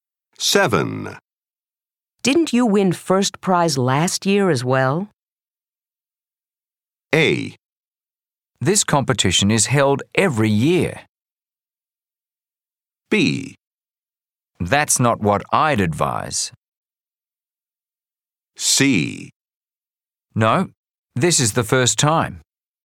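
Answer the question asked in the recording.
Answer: C: No, this is the first time.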